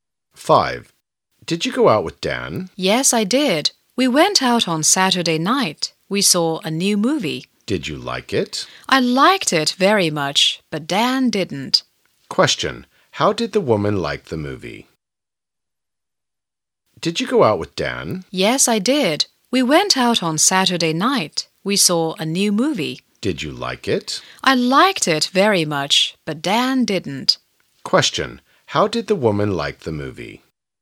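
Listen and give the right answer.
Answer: She liked it very much.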